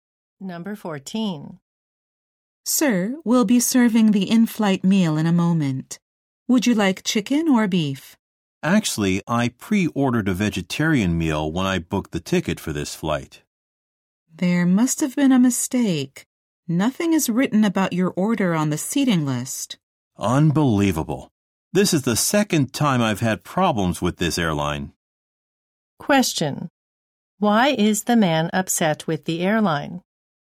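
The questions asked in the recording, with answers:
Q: Why is the man upset with the airline?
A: His pre-ordered vegetarian meal was not recorded.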